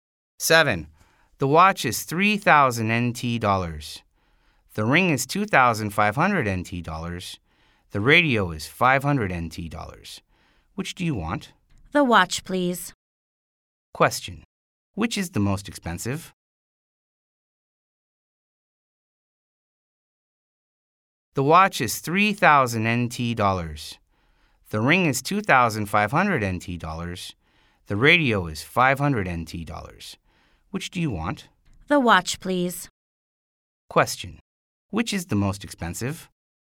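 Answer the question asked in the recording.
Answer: The watch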